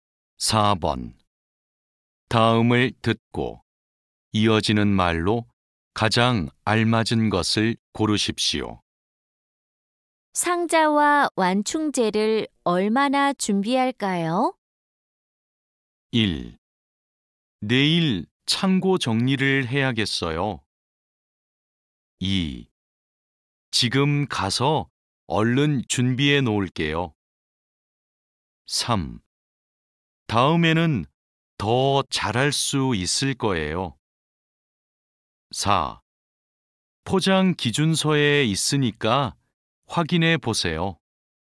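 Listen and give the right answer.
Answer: 4: 포장 기준서에 있으니까 확인해 보세요.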